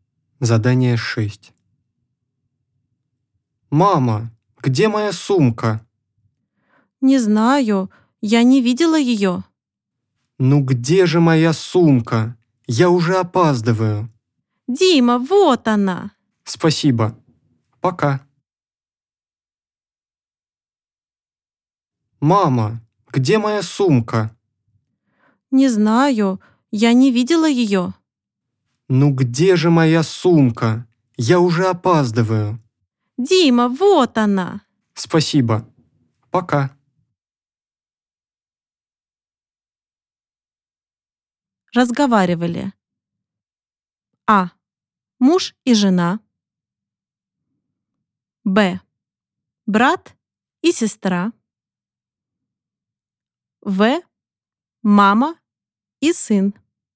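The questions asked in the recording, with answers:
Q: Разговаривали.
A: В: Мама и сын.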